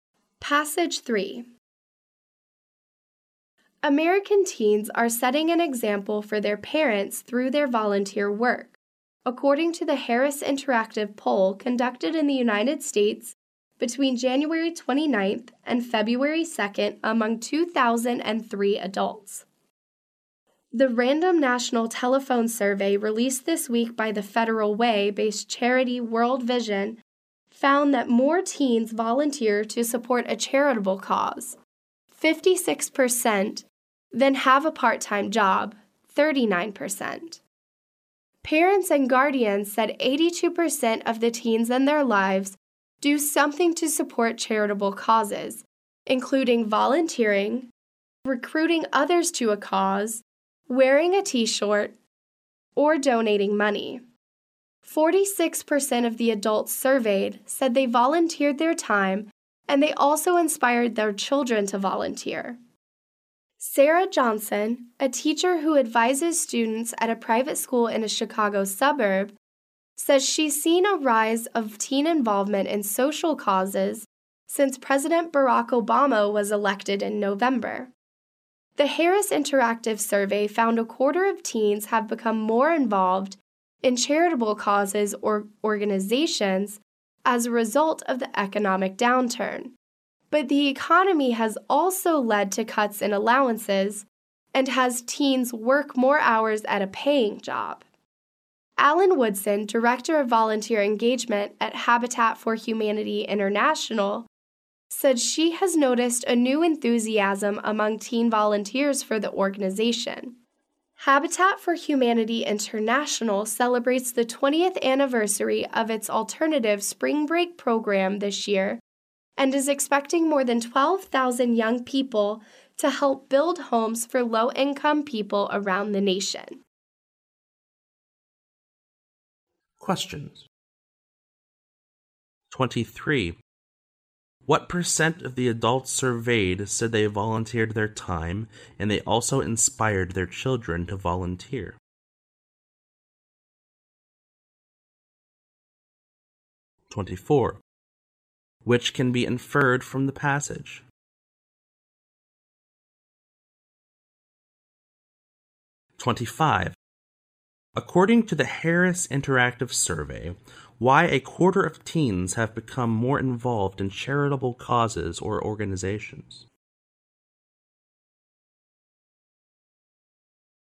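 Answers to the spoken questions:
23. 46%
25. Because of the economic downturn.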